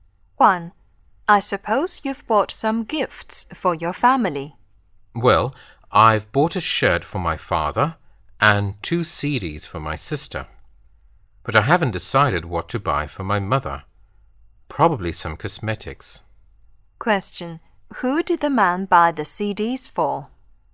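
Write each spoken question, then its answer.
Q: Who did the man buy the CDs for?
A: His sister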